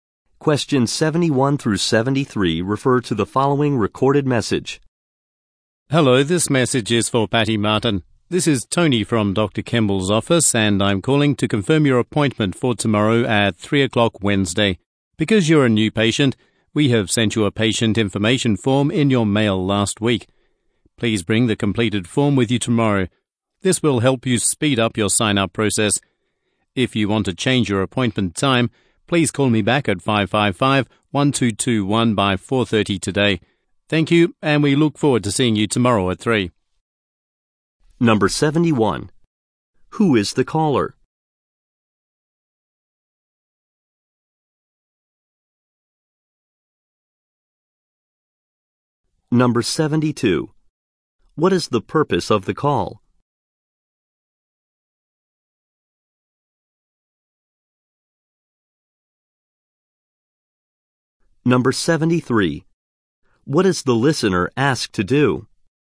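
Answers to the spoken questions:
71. An employee at Dr. Kemble's office
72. To confirm an appointment
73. Bring the completed patient information form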